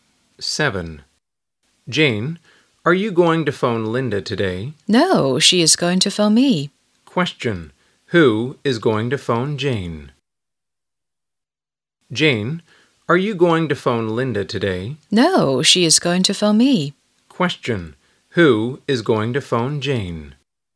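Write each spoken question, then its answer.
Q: Question, who is going to phone Jane?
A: Linda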